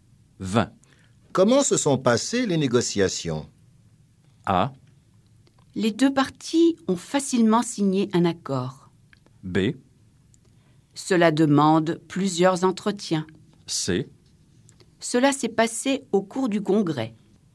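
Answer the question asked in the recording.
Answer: A: Les deux parties ont facilement signé un accord.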